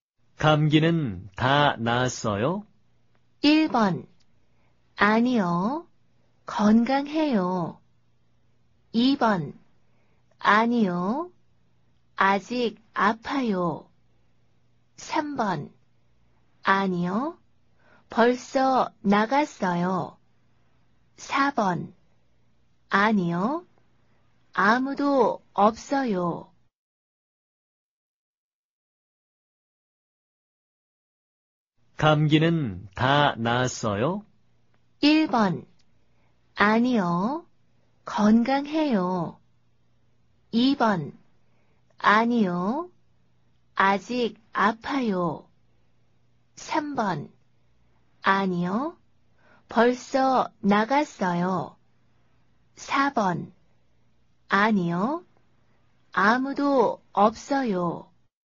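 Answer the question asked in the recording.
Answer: 2: 아니요. 아직 아파요.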